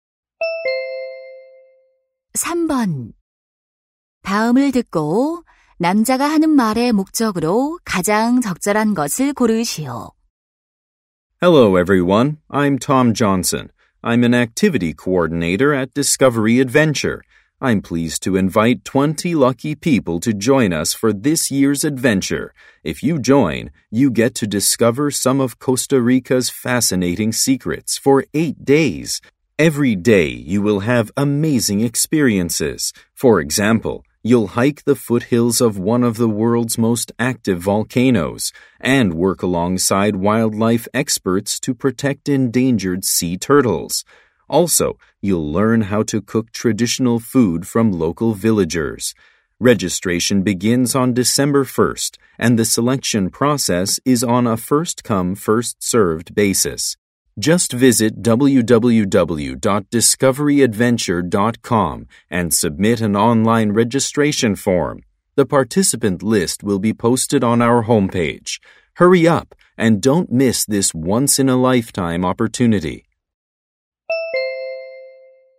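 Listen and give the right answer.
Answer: 코스타리카 모험 프로그램 참가자를 모집하려고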